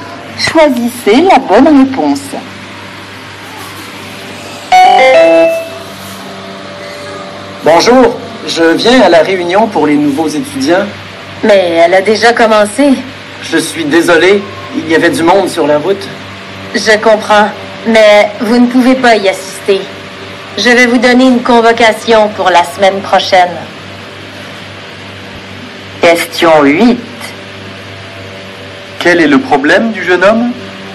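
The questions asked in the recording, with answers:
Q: Quel est le problème du jeune homme ?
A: Il est arrivé en retard à la réunion (elle a déjà commencé) et ne peut pas y assister.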